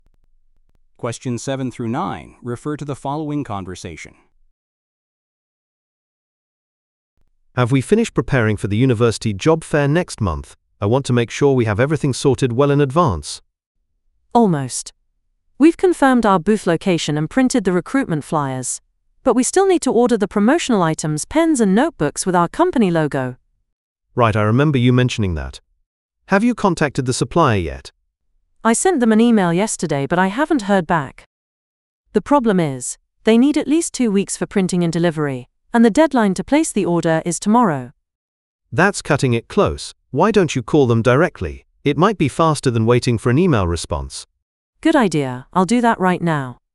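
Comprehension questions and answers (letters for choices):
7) Where will the speakers be going?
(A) A trade show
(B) A company retreat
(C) A recruitment event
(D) A product demonstration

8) What do the speakers still need to order?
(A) Booth decorations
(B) Branded giveaway items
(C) Interview schedules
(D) Travel arrangements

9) Why is the timeline urgent?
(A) The order must be placed very soon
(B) The budget has been reduced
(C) The supplier has raised prices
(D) The venue has changed locations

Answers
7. C
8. B
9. A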